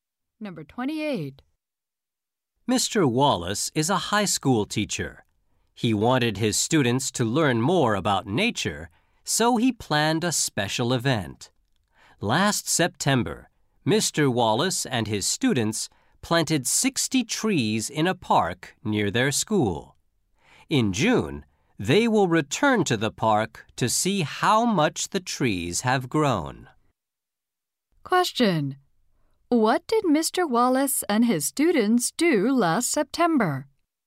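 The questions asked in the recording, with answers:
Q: What did Mr. Wallace and his students do last September?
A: Planted 60 trees in a park.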